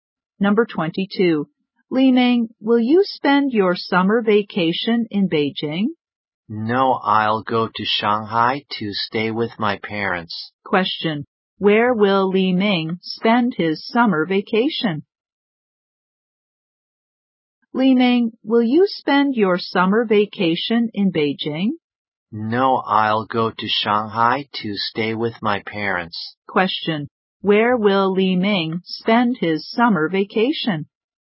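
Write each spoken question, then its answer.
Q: Question. Where will Li Ming spend his summer vacation?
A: In Shanghai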